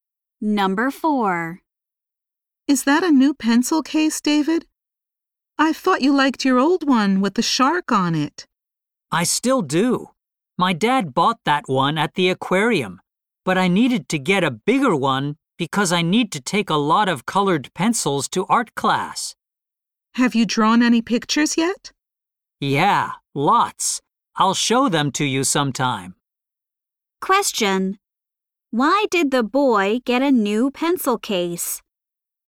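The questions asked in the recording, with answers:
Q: Why did the boy get a new pencil case?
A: He needed a bigger one to carry many colored pencils to art class.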